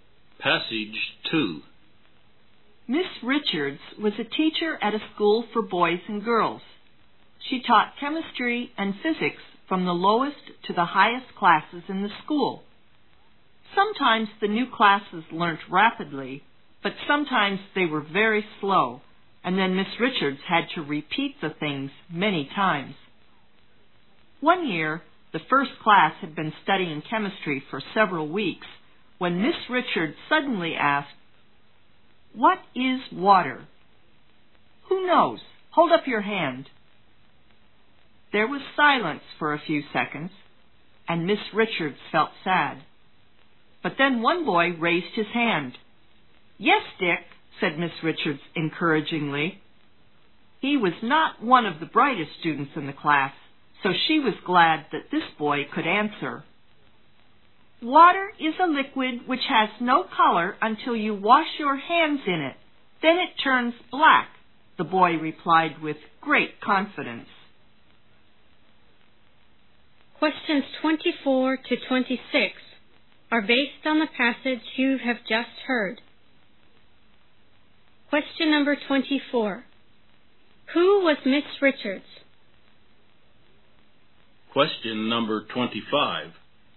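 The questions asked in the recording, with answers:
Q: Who was Miss Richards?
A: A chemistry and physics teacher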